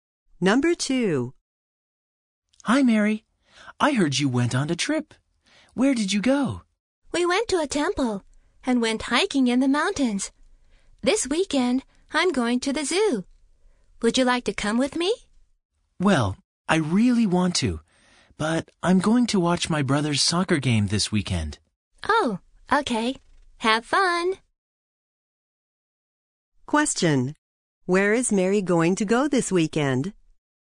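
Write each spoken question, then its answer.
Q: Where is Mary going to go this weekend?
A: To her brother's soccer game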